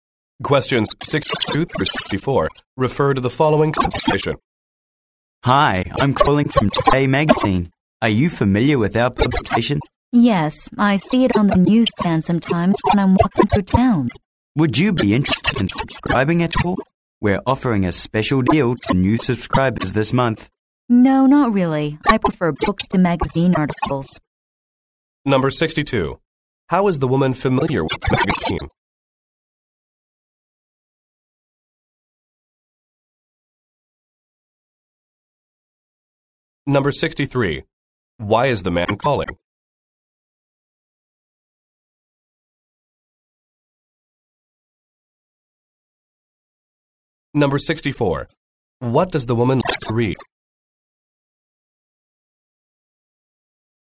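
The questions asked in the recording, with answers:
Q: How is the woman familiar with the magazine?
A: She sees it on the newsstand

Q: Why is the man calling?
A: To sell a subscription

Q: What does the woman like to read?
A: Books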